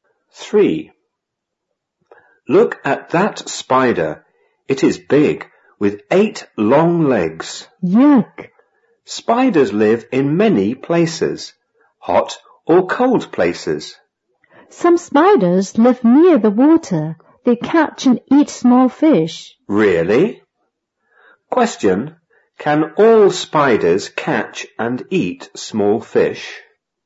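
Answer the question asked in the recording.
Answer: No, only some spiders that live near the water.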